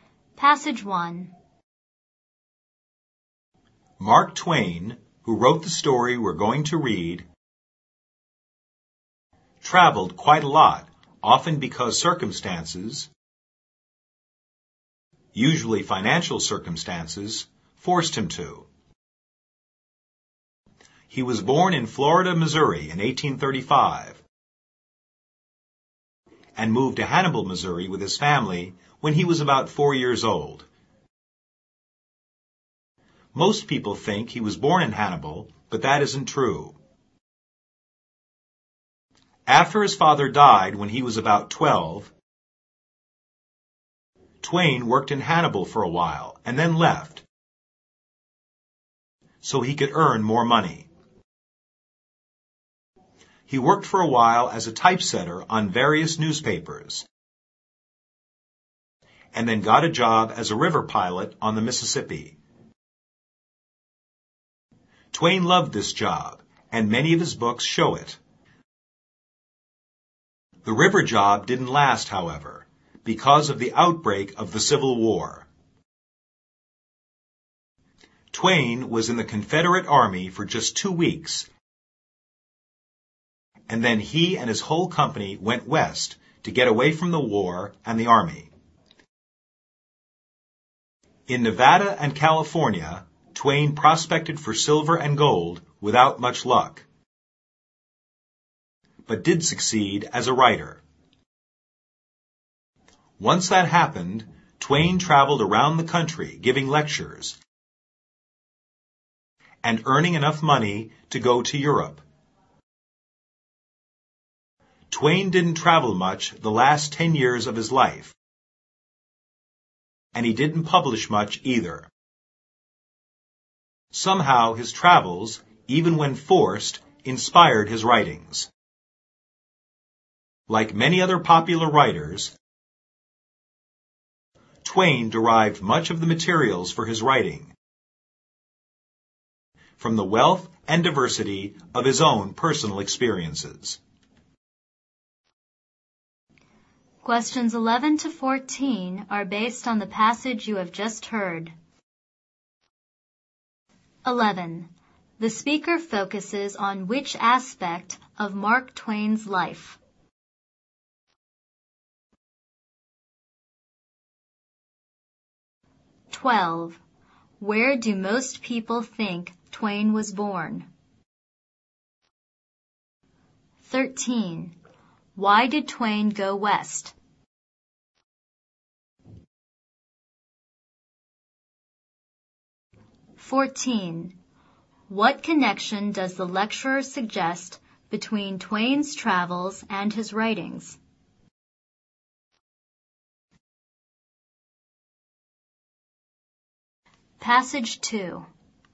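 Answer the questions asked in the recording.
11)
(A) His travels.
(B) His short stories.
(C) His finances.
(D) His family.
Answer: (A) His travels.
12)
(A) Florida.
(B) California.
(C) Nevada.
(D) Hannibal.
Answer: (D) Hannibal.
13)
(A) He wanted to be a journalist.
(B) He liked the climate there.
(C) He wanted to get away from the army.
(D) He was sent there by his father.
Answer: (C) He wanted to get away from the army.
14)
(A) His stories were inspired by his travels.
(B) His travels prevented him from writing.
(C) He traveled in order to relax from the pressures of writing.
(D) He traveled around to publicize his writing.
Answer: (A) His stories were inspired by his travels.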